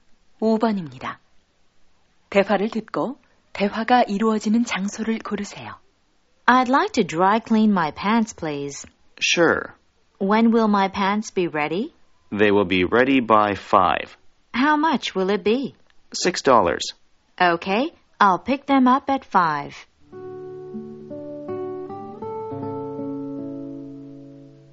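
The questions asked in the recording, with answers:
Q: 대화를 듣고 대화가 이루어지는 장소를 고르세요.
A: 세탁소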